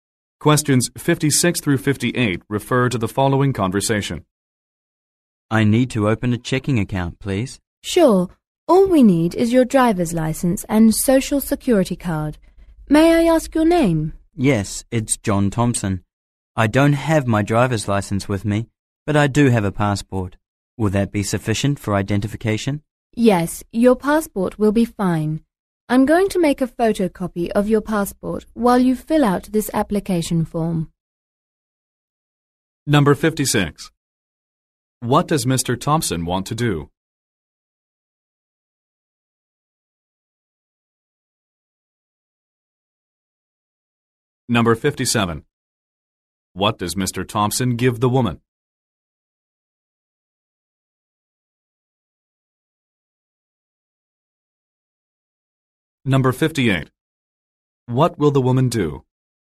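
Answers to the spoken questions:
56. Open a checking account
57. His passport
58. Make a photocopy of his passport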